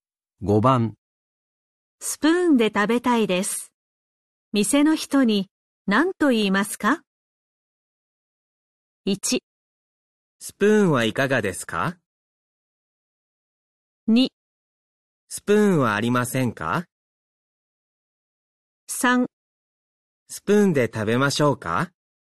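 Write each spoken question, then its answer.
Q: スプーンで食べたいです。店の人に何と言いますか?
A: 2: スプーンはありませんか?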